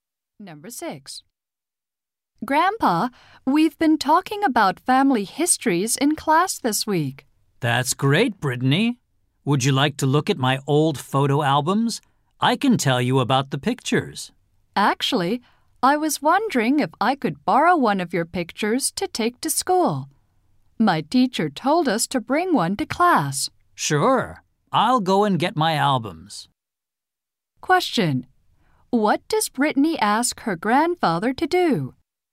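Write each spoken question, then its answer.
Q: What does Brittany ask her grandfather to do?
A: Lend her one of his pictures to take to school.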